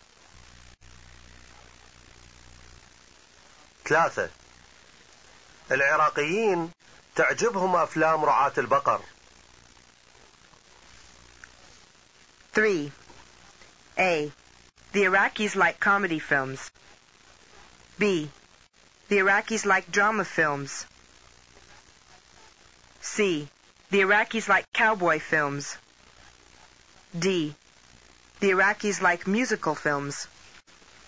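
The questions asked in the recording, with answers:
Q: ثلاثة. العراقيين تعجبهم أفلام رعاة البقر.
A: C: The Iraqis like cowboy films.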